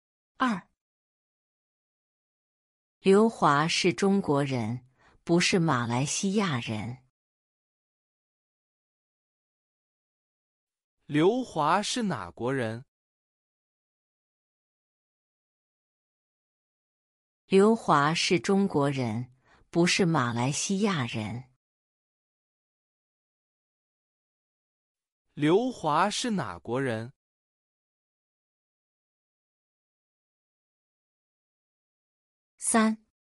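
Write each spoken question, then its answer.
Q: 刘华是哪国人?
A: 中国人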